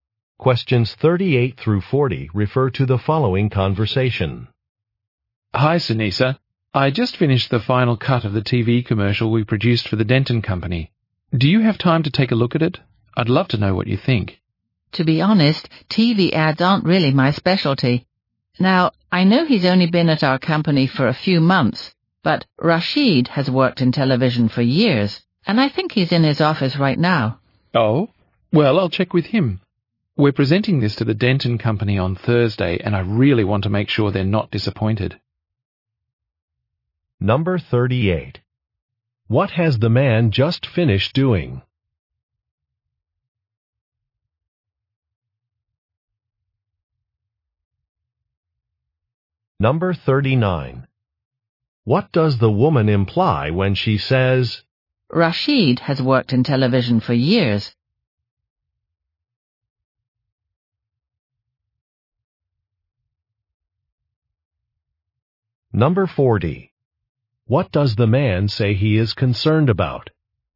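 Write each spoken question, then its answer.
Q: What has the man just finished doing?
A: Editing the final cut of a TV commercial

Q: What does the woman imply when she says,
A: Rashid should review the commercial

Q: What does the man say he is concerned about?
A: Disappointing the client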